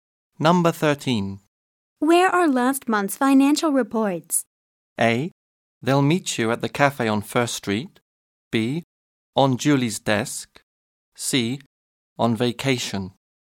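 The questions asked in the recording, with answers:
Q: Where are last month's financial reports?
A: B: On Julie's desk.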